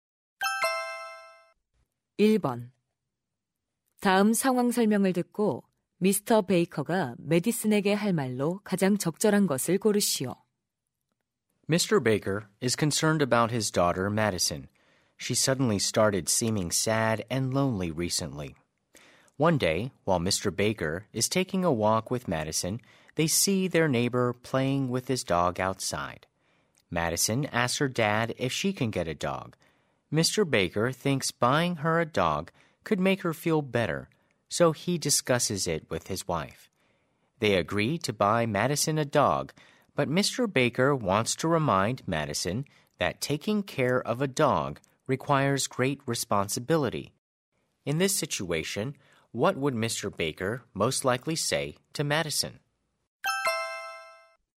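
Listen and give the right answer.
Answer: OK, you can get a dog, but you must remember that taking care of a dog is a big responsibility.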